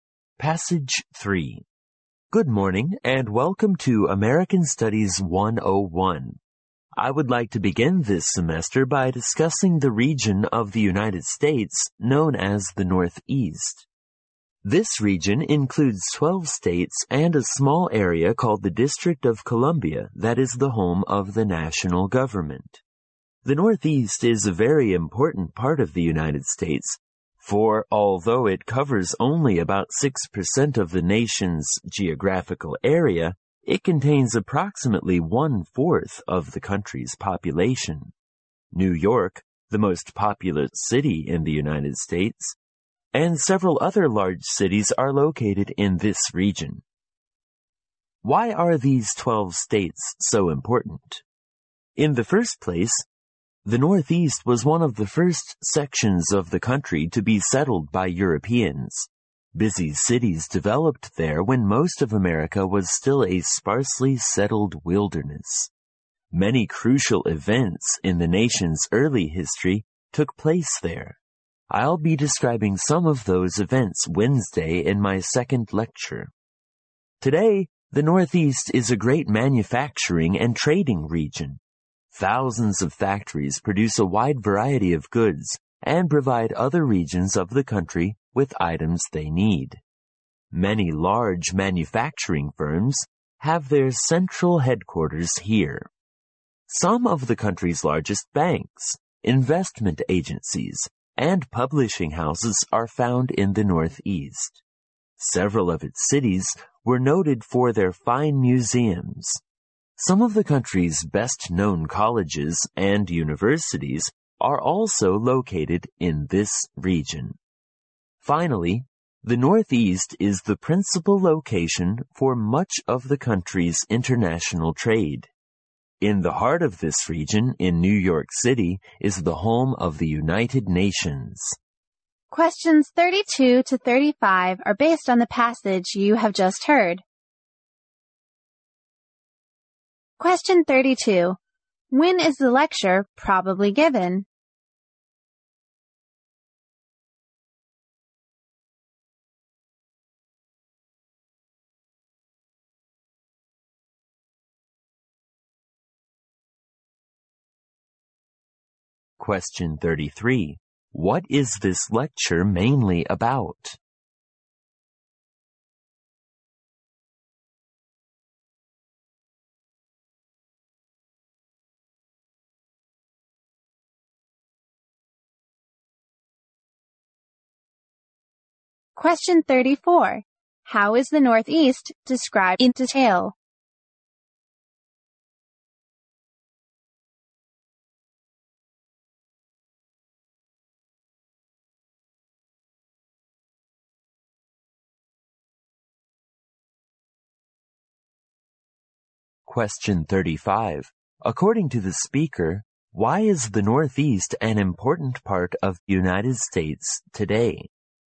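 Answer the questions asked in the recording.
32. On the first day of the semester
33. The Northeast region of the United States
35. It is a great manufacturing and trading region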